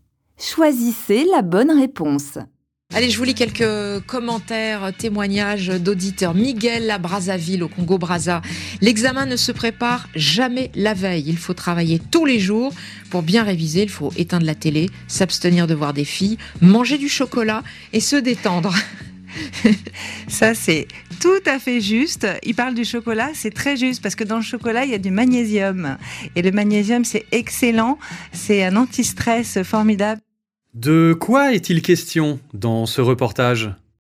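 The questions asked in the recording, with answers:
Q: De quoi est-il question dans ce reportage ?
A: Des conseils d'auditeurs pour bien préparer un examen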